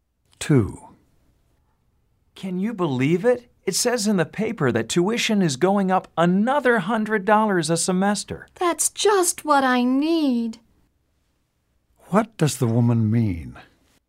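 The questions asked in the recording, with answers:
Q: What does the woman mean?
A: She is unhappy about the tuition increase.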